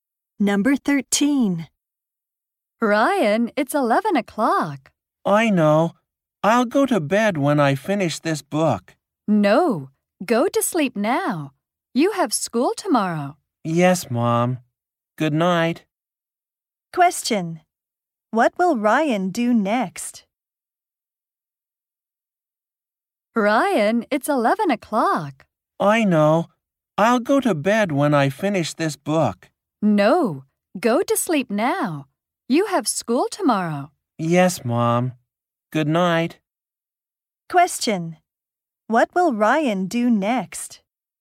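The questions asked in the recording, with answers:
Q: What will Ryan do next?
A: Go to sleep.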